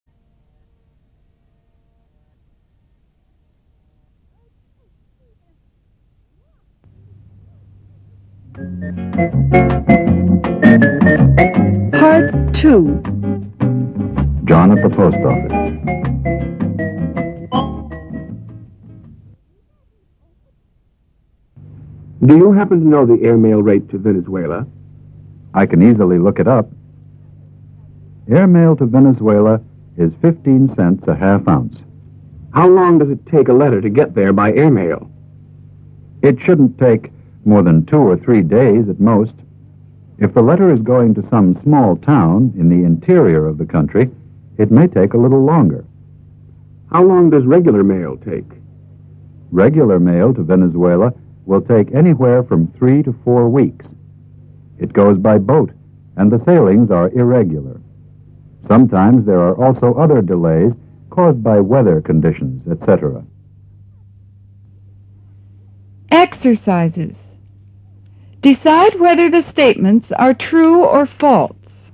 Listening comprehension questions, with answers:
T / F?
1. The airmail rate to Venezuela is 50 cents a half ounce.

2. It usually takes two or three days for a letter to get to Venezuela by air.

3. It may take three to four weeks for a letter to get to the interior of the country by air.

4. Regular mail to Venezuela goes by boat.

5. Regular mail to Venezuela takes a longer time, because the sailings are irregular.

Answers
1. F
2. T
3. F
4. T
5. T

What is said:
John At The Post Office (43")
John: Do you happen to know the airmail rate to Venezuela ?
Clerk: I can easily look it up. Airmail to Venezuela is 15 cents a half ounce.
John: How long does it take a letter to get there by air-mail ?
Glerk: It shouldn't take more than two or three days at most.
If a letter is going to some small town in the interior of the country, it may take a little longer.
John: How long does regular mail take ?
Clerk: Regular mail to Venezuela will take anywhere from three to four weeks. It goes by boat and the sailings are irregular. Sometimes there are also other delays caused by weather conditions, etc.
How Did Postage Stamps Come Into Use (1′44′′)
When you send a letter or a postcard, you have to put stamps on the envelope or on the card. When did people first begin to use stamps ?